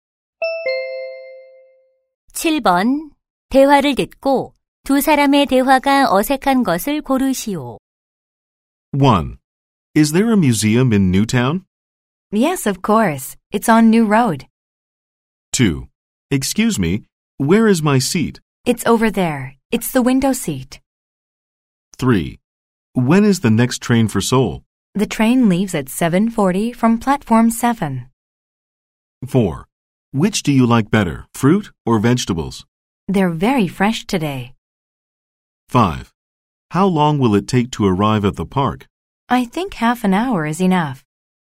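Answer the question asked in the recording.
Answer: 4: Which do you like better, fruit or vegetables? / They're very fresh today.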